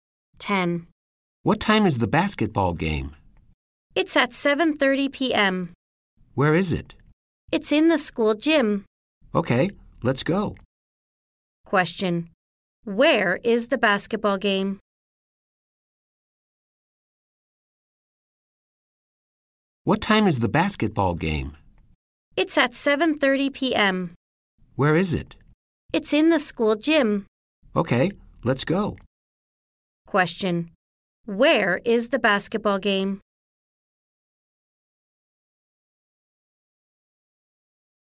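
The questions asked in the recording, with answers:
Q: Where is the basketball game?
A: In the school gym.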